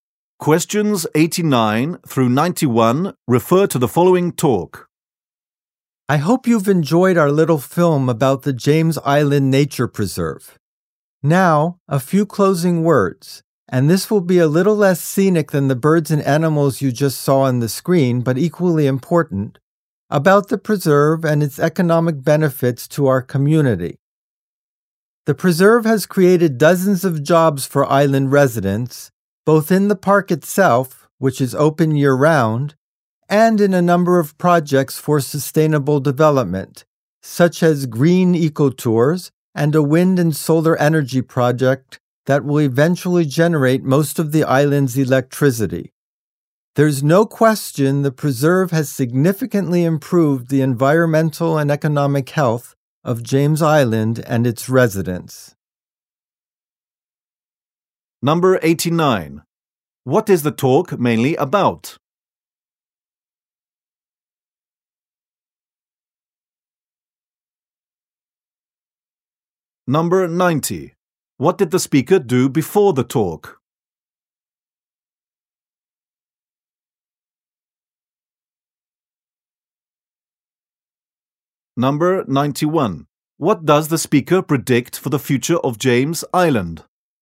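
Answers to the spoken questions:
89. The economic benefits of the nature preserve
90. Showed a film
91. Most of its electricity will come from wind and solar energy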